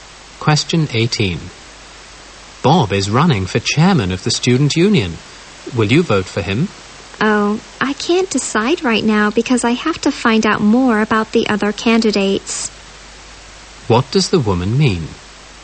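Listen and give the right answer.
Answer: She wants to learn more about the other candidates before deciding.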